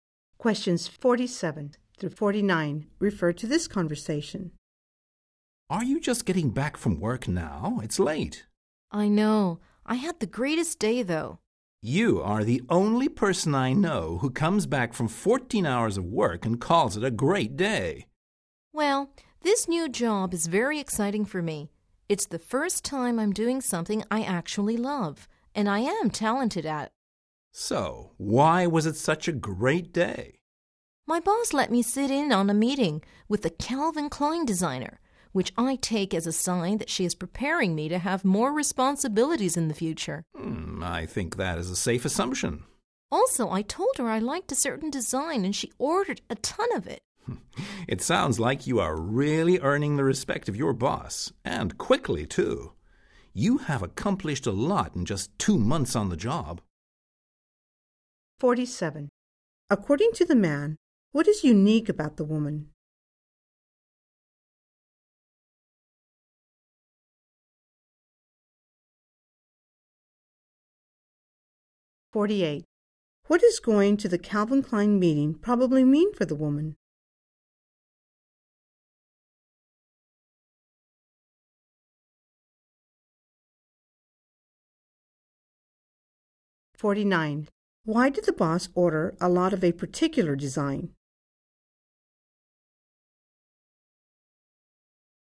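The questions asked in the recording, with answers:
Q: According to the man, what is unique about the woman?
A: She calls a 14-hour workday a great day

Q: What does going to the Calvin Klein meeting probably mean for the woman?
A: She is being prepared for more responsibilities

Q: Why did the boss order a lot of a particular design?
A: The woman said she liked it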